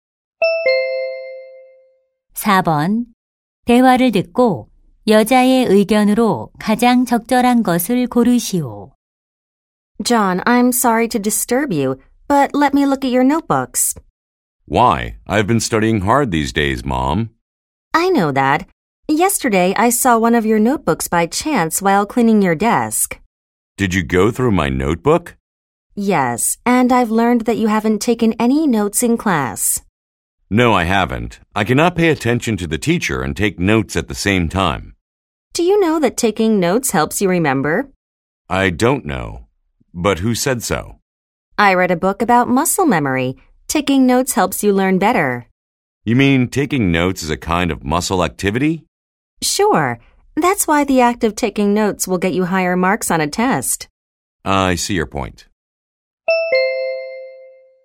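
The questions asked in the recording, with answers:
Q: 대화를 듣고 여자의 의견으로 가장 적절한 것을 고르시오.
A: 필기를 하면 더 잘 기억하고 학습에 도움이 된다.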